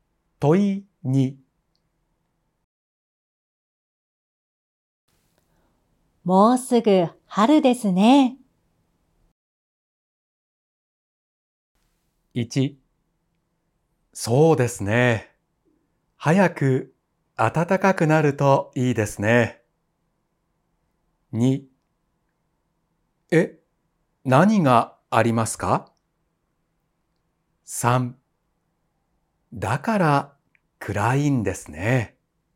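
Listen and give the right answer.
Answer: 1: そうですね。早く暖かくなるといいですね。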